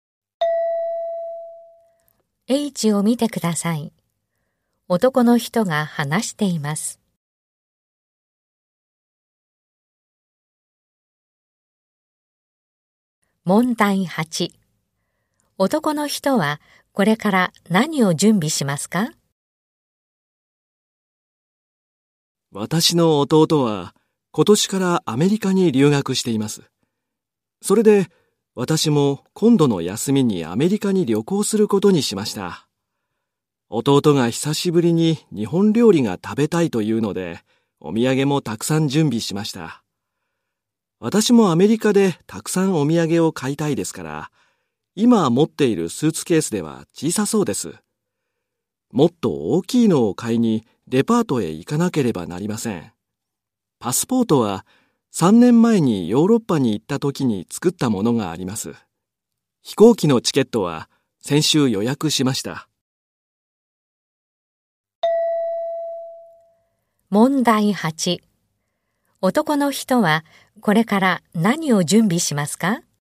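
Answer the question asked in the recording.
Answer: 大きいスーツケース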